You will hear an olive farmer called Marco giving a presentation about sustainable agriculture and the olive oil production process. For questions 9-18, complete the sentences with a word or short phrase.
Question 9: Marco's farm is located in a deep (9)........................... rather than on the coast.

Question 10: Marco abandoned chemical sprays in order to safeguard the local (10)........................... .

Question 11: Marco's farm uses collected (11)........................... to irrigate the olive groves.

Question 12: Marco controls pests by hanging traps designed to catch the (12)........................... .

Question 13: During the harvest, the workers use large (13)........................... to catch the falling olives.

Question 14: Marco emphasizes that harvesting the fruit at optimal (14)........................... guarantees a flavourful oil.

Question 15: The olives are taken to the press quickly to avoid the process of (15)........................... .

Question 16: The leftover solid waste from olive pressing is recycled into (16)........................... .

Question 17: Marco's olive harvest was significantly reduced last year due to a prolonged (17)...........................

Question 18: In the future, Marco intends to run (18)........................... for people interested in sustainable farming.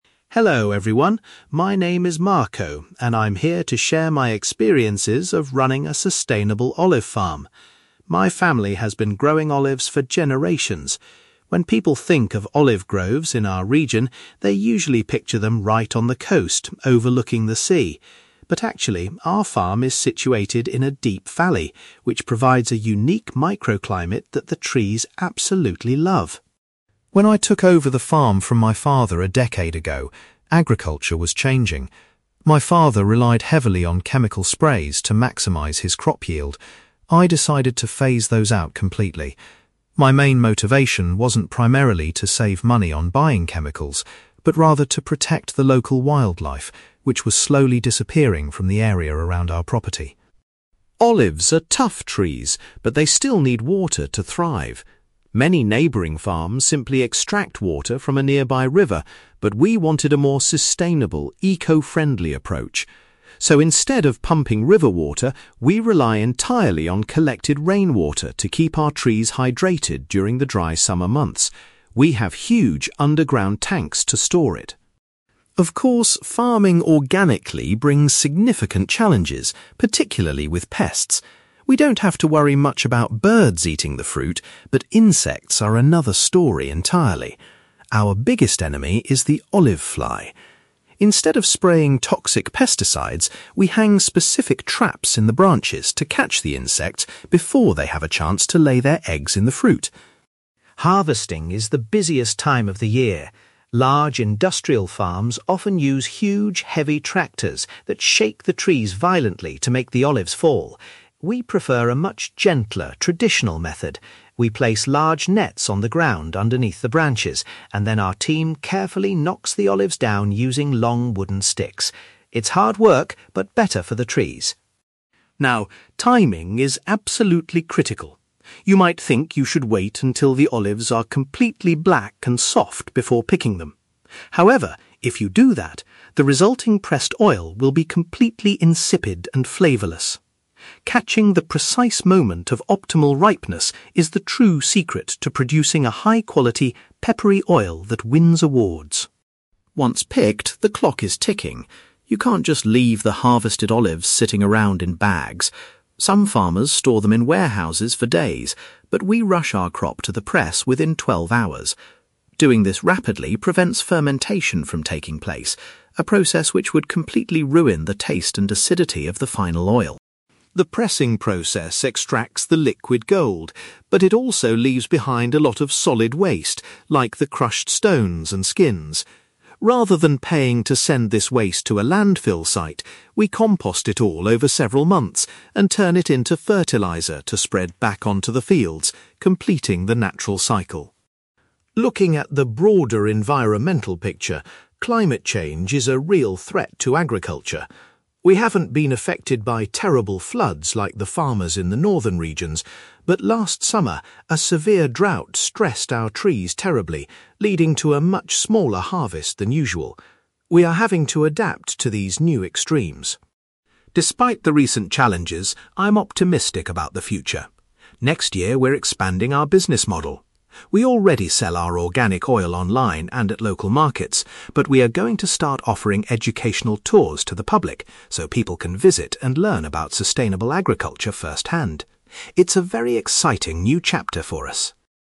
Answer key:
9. valley
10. wildlife
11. rainwater
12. insects
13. nets
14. ripeness
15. fermentation
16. fertiliser
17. drought
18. educational tours

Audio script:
Marco: Hello everyone, my name is Marco, and I'm here to share my experiences of running a sustainable olive farm. My family has been growing olives for generations. When people think of olive groves in our region, they usually picture them right on the coast, overlooking the sea. But actually, our farm is situated in a deep valley, which provides a unique microclimate that the trees absolutely love.
When I took over the farm from my father a decade ago, agriculture was changing. My father relied heavily on chemical sprays to maximize his crop yield. I decided to phase those out completely. My main motivation wasn't primarily to save money on buying chemicals, but rather to protect the local wildlife, which was slowly disappearing from the area around our property.
Olives are tough trees, but they still need water to thrive. Many neighbouring farms simply extract water from a nearby river, but we wanted a more sustainable, eco-friendly approach. So, instead of pumping river water, we rely entirely on collected rainwater to keep our trees hydrated during the dry summer months. We have huge underground tanks to store it.
Of course, farming organically brings significant challenges, particularly with pests. We don't have to worry much about birds eating the fruit, but insects are another story entirely. Our biggest enemy is the olive fly. Instead of spraying toxic pesticides, we hang specific traps in the branches to catch the insects before they have a chance to lay their eggs in the fruit.
Harvesting is the busiest time of the year. Large industrial farms often use huge, heavy tractors that shake the trees violently to make the olives fall. We prefer a much gentler, traditional method. We place large nets on the ground underneath the branches, and then our team carefully knocks the olives down using long wooden sticks. It's hard work, but better for the trees.
Now, timing is absolutely critical. You might think you should wait until the olives are completely black and soft before picking them. However, if you do that, the resulting pressed oil will be completely insipid and flavourless. Catching the precise moment of optimal ripeness is the true secret to producing a high-quality, peppery oil that wins awards.
Once picked, the clock is ticking. You can't just leave the harvested olives sitting around in bags. Some farmers store them in warehouses for days, but we rush our crop to the press within twelve hours. Doing this rapidly prevents fermentation from taking place, a process which would completely ruin the taste and acidity of the final oil.
The pressing process extracts the liquid gold, but it also leaves behind a lot of solid waste, like the crushed stones and skins. Rather than paying to send this waste to a landfill site, we compost it all over several months and turn it into fertiliser to spread back onto the fields, completing the natural cycle.
Looking at the broader environmental picture, climate change is a real threat to agriculture. We haven't been affected by terrible floods like the farmers in the northern regions, but last summer, a severe drought stressed our trees terribly, leading to a much smaller harvest than usual. We are having to adapt to these new extremes.
Despite the recent challenges, I'm optimistic about the future. Next year, we're expanding our business model. We already sell our organic oil online and at local markets, but we are going to start offering educational tours to the public so people can visit and learn about sustainable agriculture firsthand. It's a very exciting new chapter for us.

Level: B2